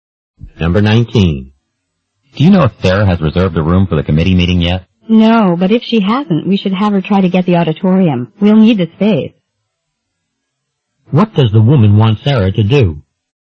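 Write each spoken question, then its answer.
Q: What does the woman want Sarah to do?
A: Reserve the auditorium.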